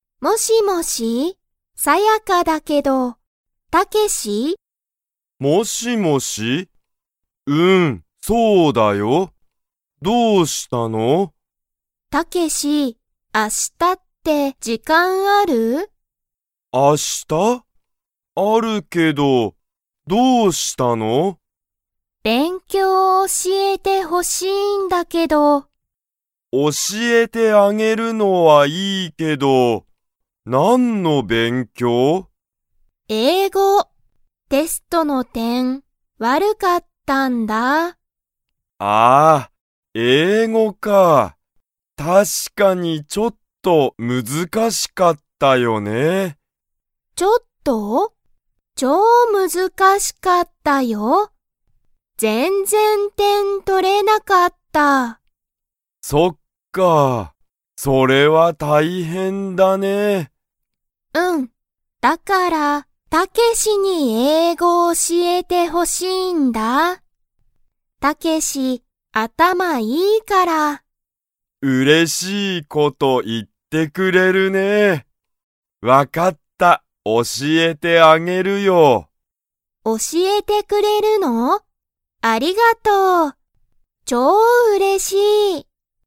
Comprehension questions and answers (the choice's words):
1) タケシは明日(あした)、時間(じかん)がありますか?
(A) はい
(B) いいえ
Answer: はい

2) サヤカは、____の勉強(べんきょう)を教(おし)えてほしい。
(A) 映画(えいが)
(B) 時間(じかん)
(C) 英語(えいご)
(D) 仕事(しごと)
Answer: 英語(えいご)

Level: Level 2